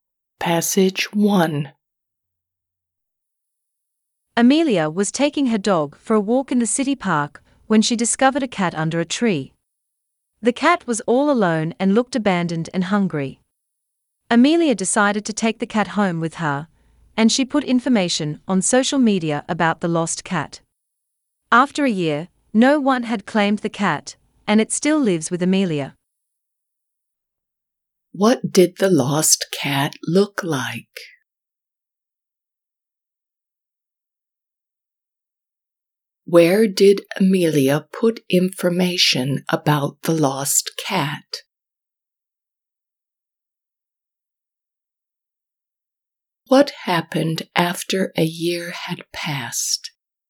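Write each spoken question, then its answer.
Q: What did the lost cat look like?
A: Abandoned and hungry

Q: Where did Amelia put information about the lost cat?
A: On social media

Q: What happened after a year had passed?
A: No one claimed it; it still lives with Amelia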